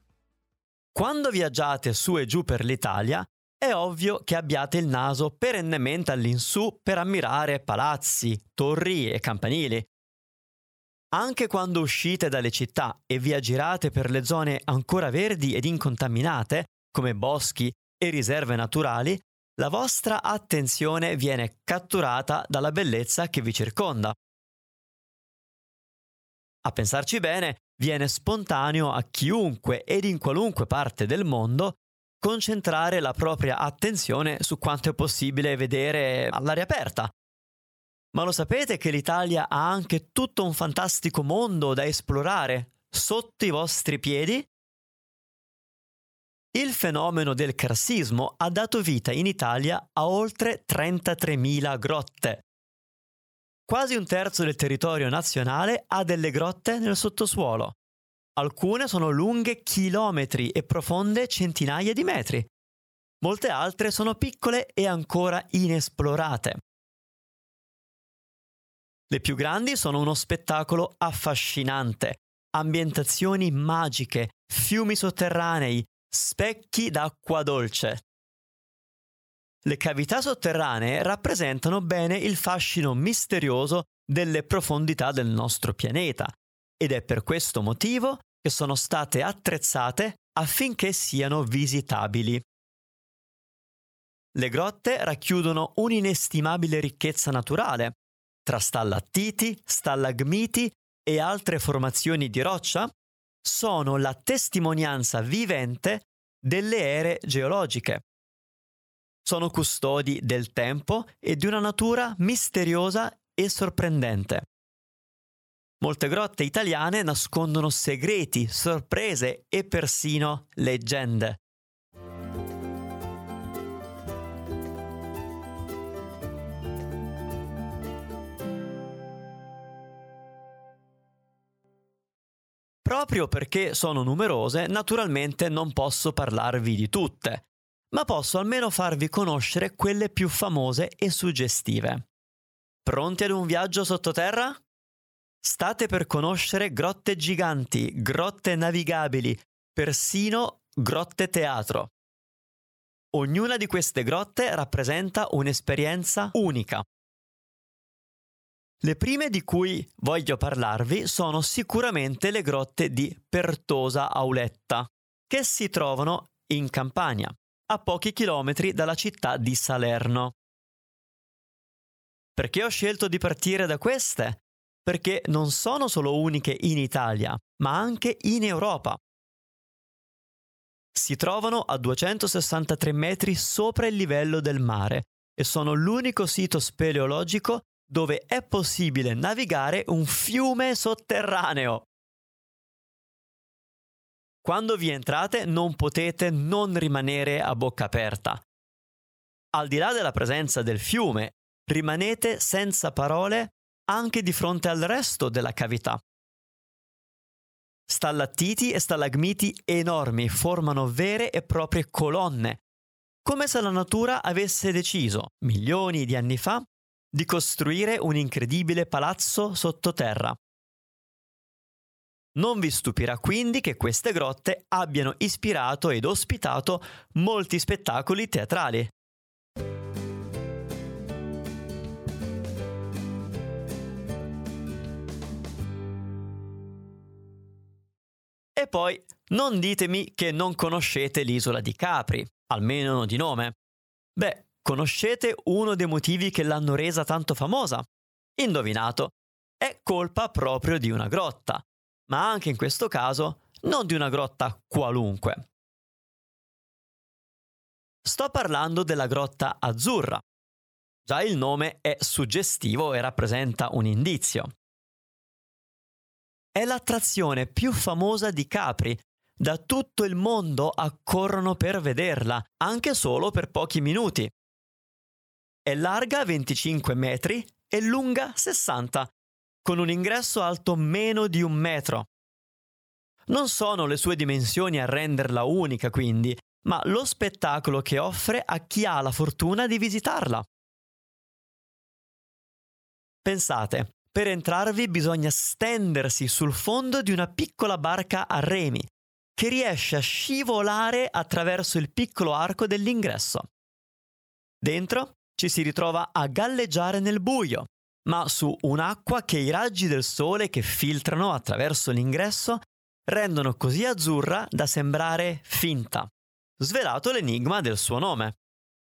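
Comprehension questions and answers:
Here are your TRUE/ FALSE Comprehension questions.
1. In Italia le grotte visitabili sono poche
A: Falso

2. Tutte le grotte esistenti in Italia sono già state esplorate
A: Falso

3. Le Grotte di Pertosa-Auletta si trovano vicino a Salerno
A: Vero

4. Nelle Grotte di Pertosa-Auletta si sono tenuti spettacoli teatrali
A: Vero

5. La Grotta Azzurra ha reso famosa l'isola di Capri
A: Vero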